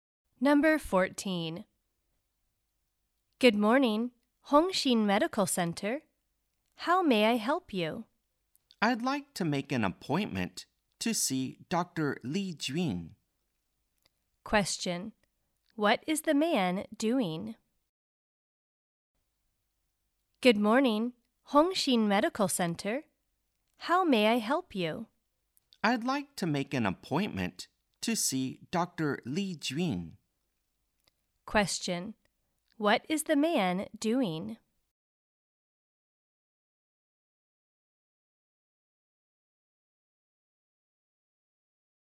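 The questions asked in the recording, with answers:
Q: What is the man doing?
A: Making an appointment to see Dr. Li Jun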